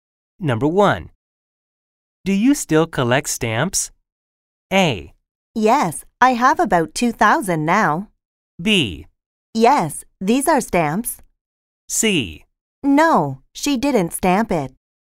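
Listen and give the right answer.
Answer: A: Yes, I have about 2,000 now.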